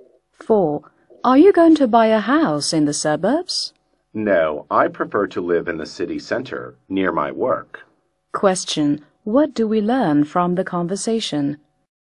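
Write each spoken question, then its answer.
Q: What do we learn from the conversation?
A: The man prefers to live in the city center, near his work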